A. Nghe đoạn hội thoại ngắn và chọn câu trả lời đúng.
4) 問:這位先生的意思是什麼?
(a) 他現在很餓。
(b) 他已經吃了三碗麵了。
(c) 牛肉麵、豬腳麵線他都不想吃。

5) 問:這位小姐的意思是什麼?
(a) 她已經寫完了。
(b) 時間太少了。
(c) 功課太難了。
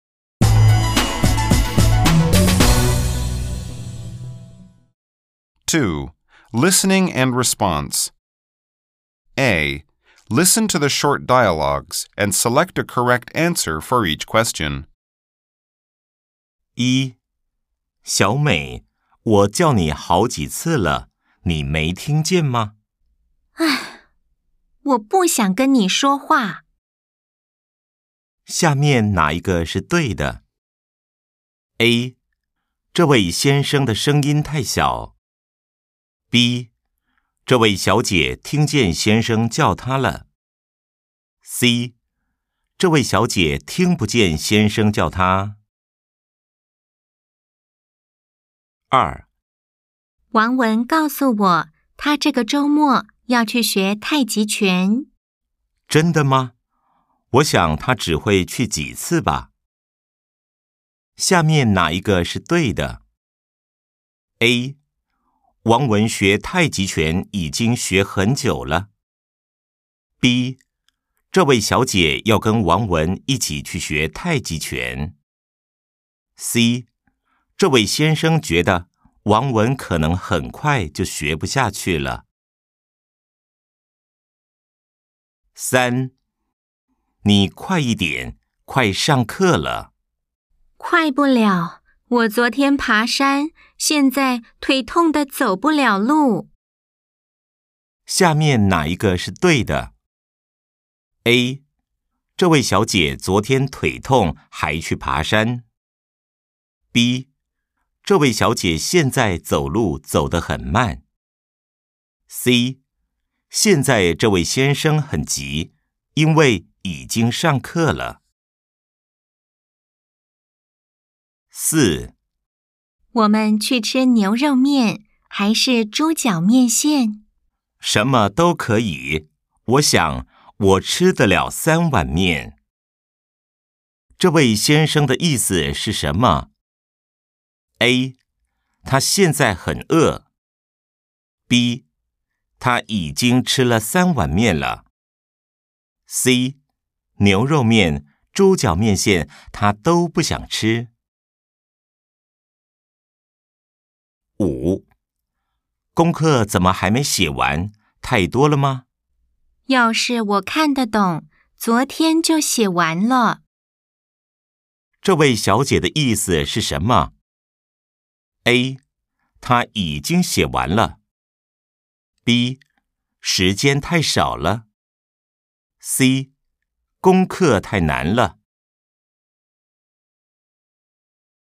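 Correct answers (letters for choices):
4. a
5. c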